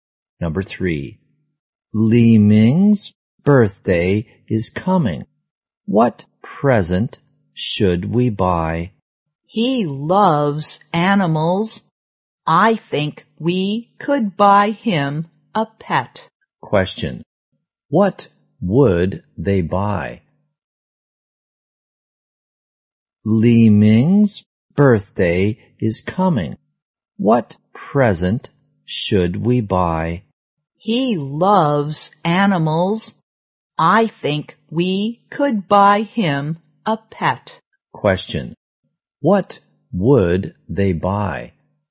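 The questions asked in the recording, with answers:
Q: what would they buy?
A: A pet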